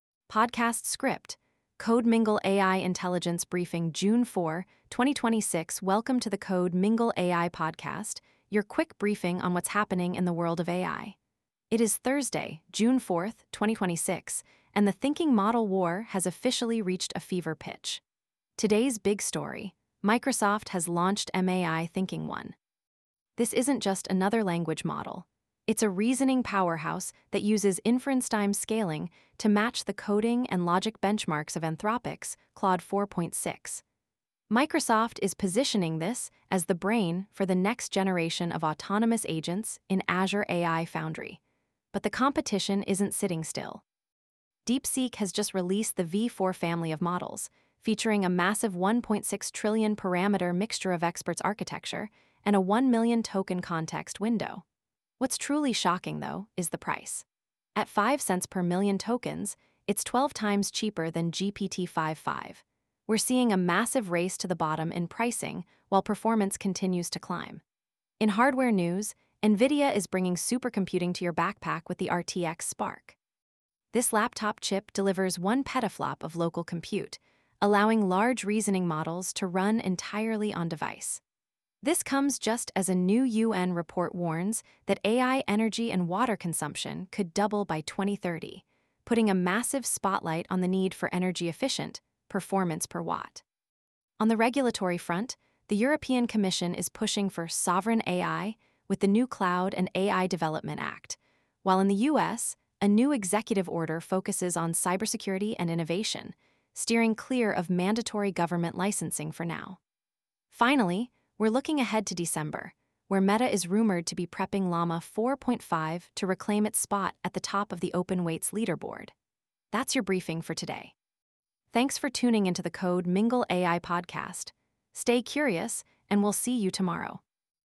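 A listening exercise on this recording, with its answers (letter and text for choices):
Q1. Which model recently matched Claude 4.6 in coding and reasoning benchmarks?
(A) GPT-5.5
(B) Llama 4.0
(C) MAI-Thinking-1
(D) Gemini 3.1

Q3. What is the price of DeepSeek V4-Pro compared to GPT-5.5?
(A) Half the price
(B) Same price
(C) 12x cheaper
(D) 2x more expensive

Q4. Which new NVIDIA chip provides 1 petaflop of local compute for laptops?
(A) H100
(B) Blackwell B200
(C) RTX Spark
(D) Thor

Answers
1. (C) MAI-Thinking-1
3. (C) 12x cheaper
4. (C) RTX Spark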